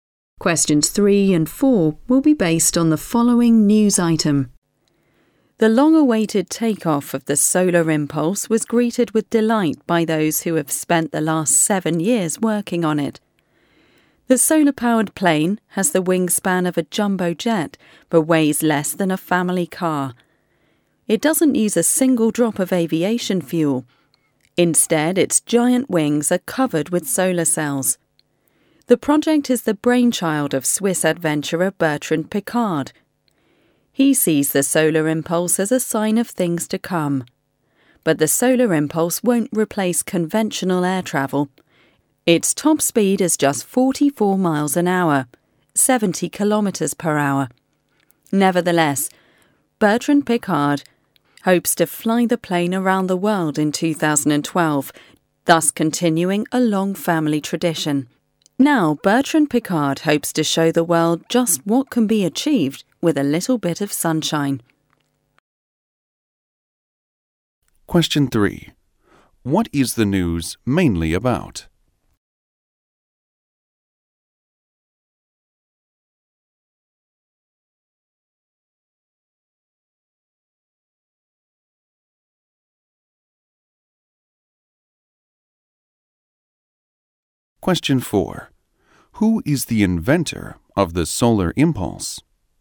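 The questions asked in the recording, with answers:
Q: What is the news mainly about?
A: The takeoff of the Solar Impulse, a solar-powered plane

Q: Who is the inventor of the solar impulse?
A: Bertrand Piccard, a Swiss adventurer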